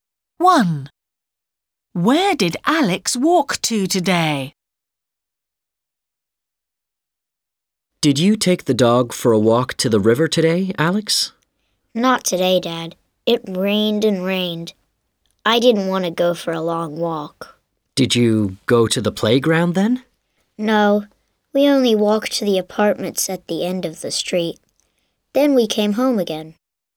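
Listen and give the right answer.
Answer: To the apartments at the end of the street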